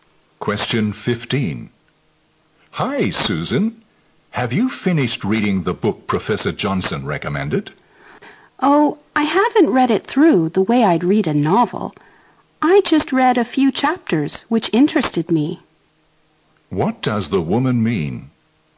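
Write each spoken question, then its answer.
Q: What does the woman mean?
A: She only read the chapters that interested her.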